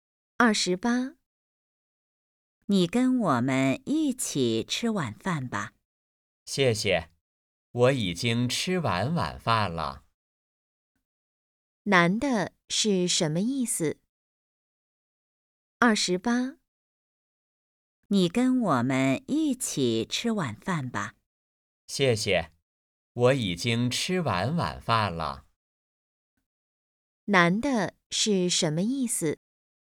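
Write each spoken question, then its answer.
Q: 男的是什么意思?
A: 他已经吃过晚饭了,不一起吃了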